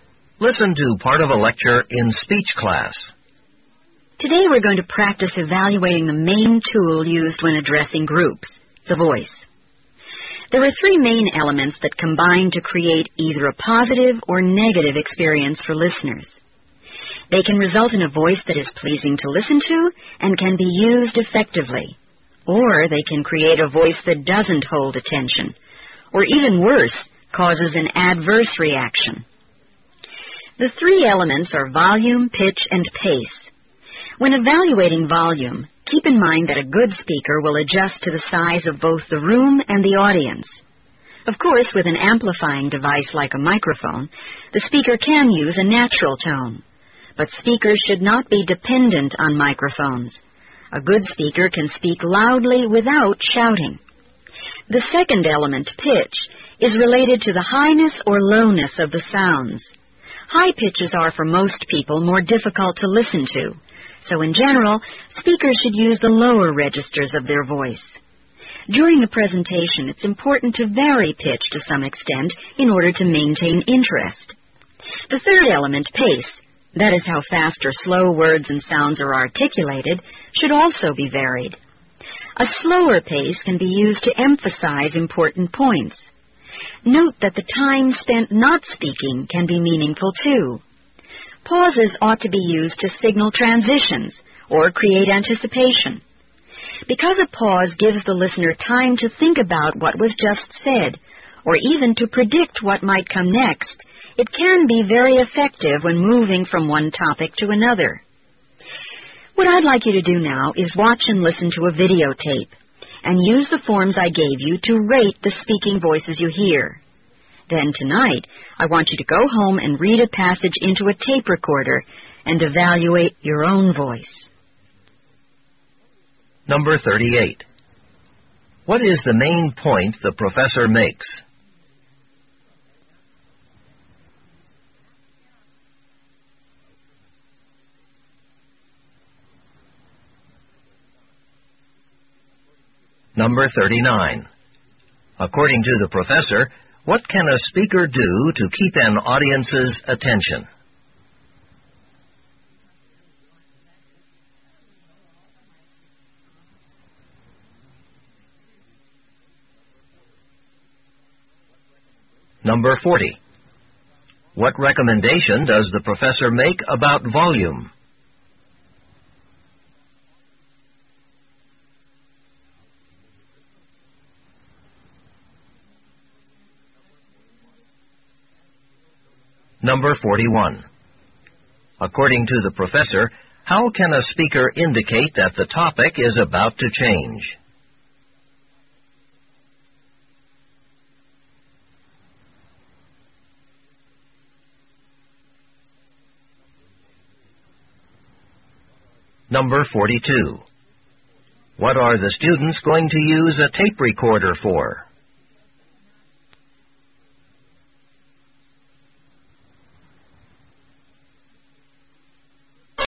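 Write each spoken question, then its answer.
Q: What is the main point the professor makes?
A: Volume, pitch and pace combine to make a voice pleasing or not for listeners

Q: According to the professor, what can a speaker do to keep an audience's attention?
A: Vary the pitch of the voice

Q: What recommendation does the professor make about volume?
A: Adjust it to the size of the room and the audience, speaking loudly without shouting

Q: According to the professor, how can a speaker indicate that the topic is about to change?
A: By pausing

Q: What are the students going to use a tape recorder for?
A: To record themselves reading a passage and rate their own voice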